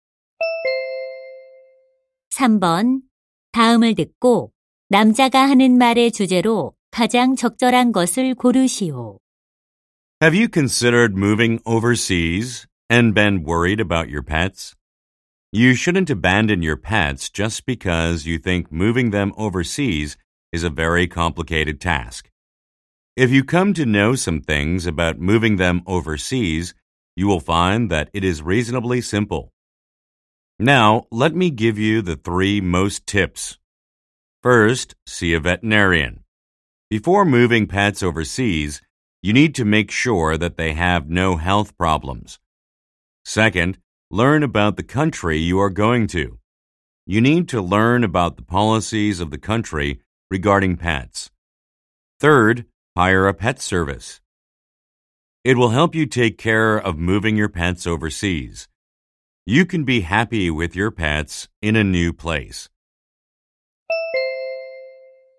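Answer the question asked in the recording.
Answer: 반려동물을 해외로 데려갈 때의 요령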